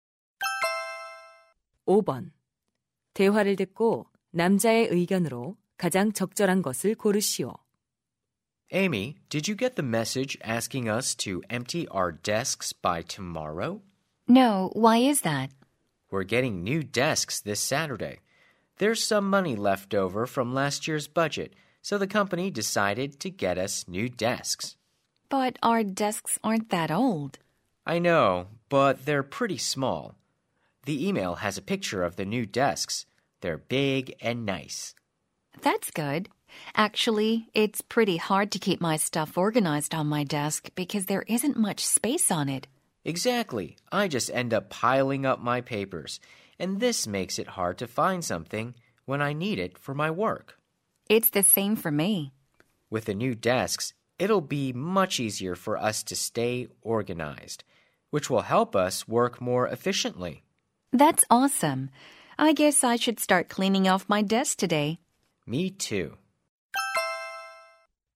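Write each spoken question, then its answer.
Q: 대화를 듣고 남자의 의견으로 가장 적절한 것을 고르시오.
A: 새 책상이 정리를 쉽게 해 업무 효율을 높일 것이다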